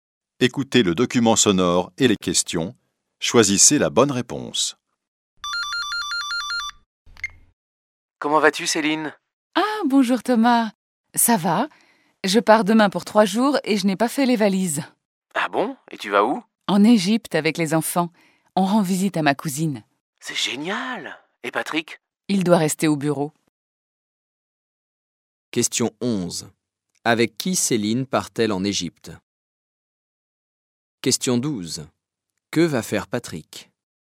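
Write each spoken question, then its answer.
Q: Avec qui Céline part-elle en Égypte ?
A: Avec ses enfants

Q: Que va faire Patrick ?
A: Il doit rester au bureau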